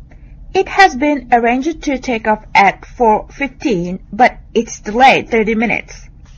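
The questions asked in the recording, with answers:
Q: When does the plane take off?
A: 4:45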